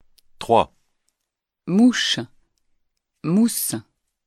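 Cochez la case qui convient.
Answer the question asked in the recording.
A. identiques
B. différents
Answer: B. différents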